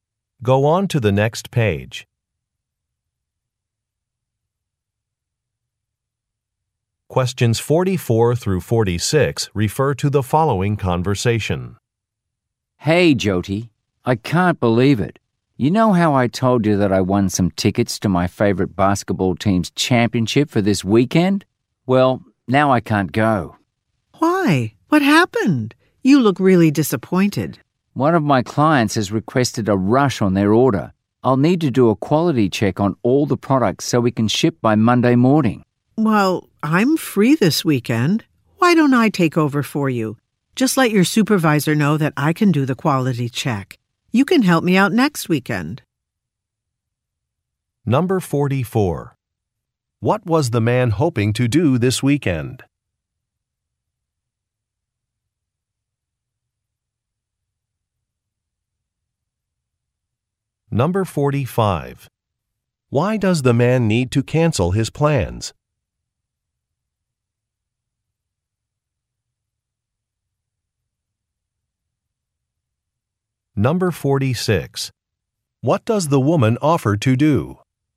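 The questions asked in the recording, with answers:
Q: What was the man hoping to do this weekend?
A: Go to a basketball championship game

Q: Why does the man need to cancel his plans?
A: A client requested a rush order

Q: What does the woman offer to do?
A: Do the quality check for him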